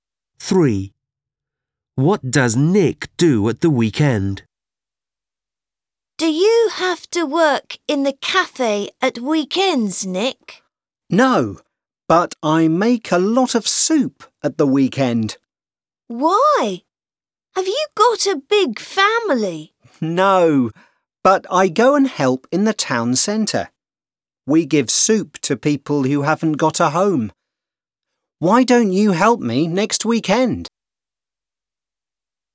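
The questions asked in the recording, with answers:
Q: What does Nick do at the weekend?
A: He makes soup and gives it to homeless people in the town centre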